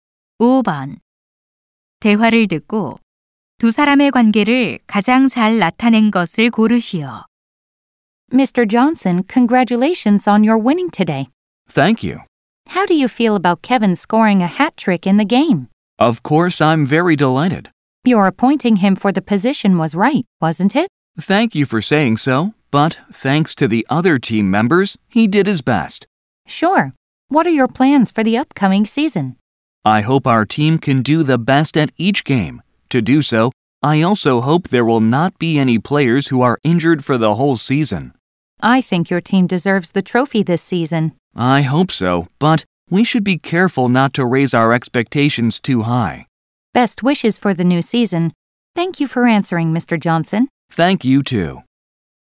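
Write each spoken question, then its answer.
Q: 대화를 듣고 두 사람의 관계를 가장 잘 나타낸 것을 고르시오.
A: 기자 - 축구 감독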